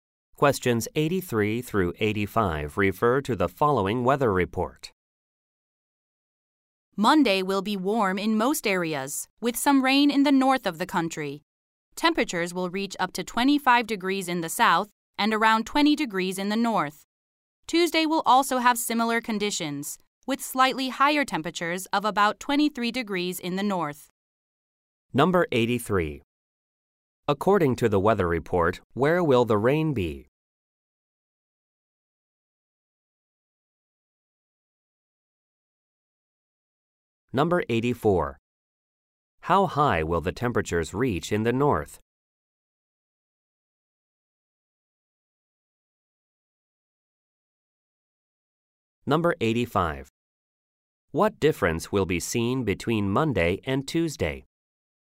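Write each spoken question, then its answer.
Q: According to the weather report, where will the rain be?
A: In the north

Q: What difference will be seen between Monday and Tuesday?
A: Tuesday will be slightly warmer in the north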